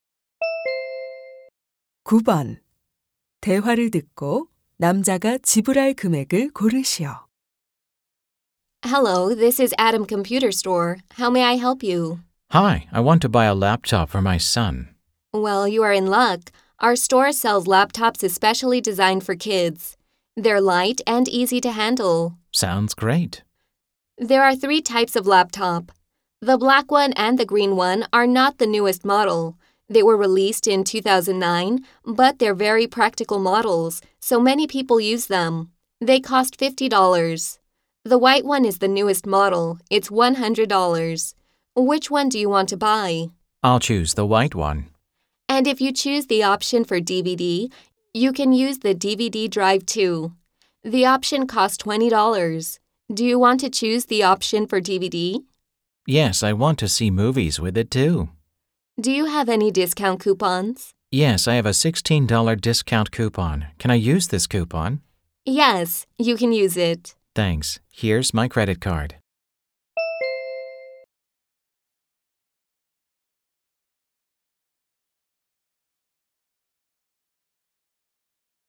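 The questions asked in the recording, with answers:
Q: 대화를 듣고 남자가 지불할 금액을 고르시오.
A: 104달러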